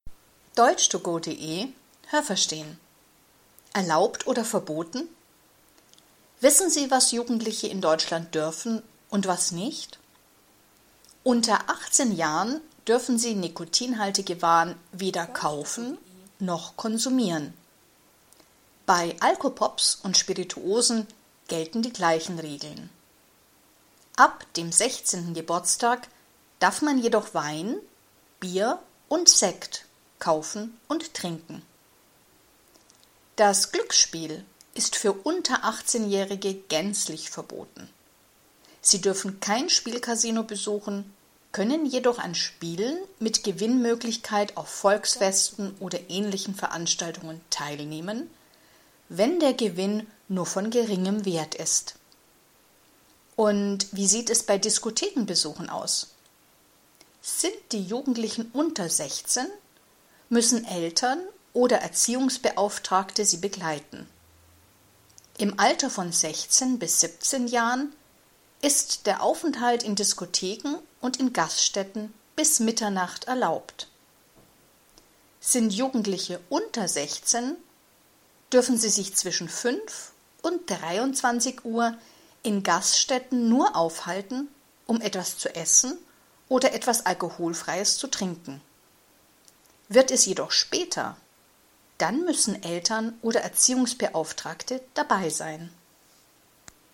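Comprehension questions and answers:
Was haben Sie gehört? Es gibt nur eine korrekte Antwort.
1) Darf ein Jugendlicher mit 17 Jahren rauchen?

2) Darf ein Jugendlicher mit 16 Alkopops trinken?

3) Darf ein 16-Jähriger Sekt kaufen?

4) Darf man mit 18 ein Spielkasino besuchen?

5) Darf ein 15-Jähriger allein tanzen gehen?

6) Darf man mit 17 Jahren allein in einer Disco sein?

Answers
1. Nein
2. Nein
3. Ja
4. Ja
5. Nein
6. Ja, bis Mitternacht

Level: B (mittel)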